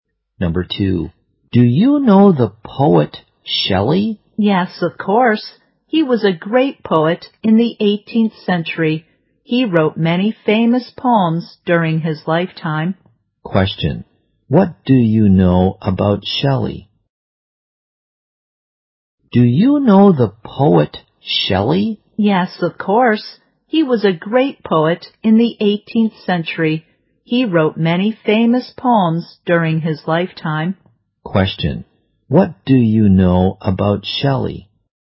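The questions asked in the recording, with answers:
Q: what do you know about Shelley?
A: He was a great poet in the 18th century.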